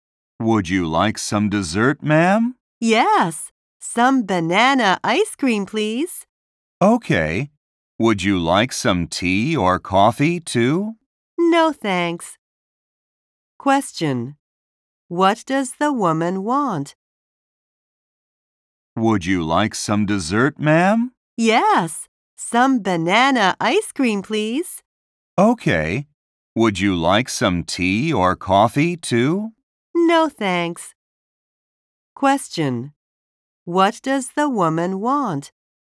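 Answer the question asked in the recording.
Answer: Banana ice cream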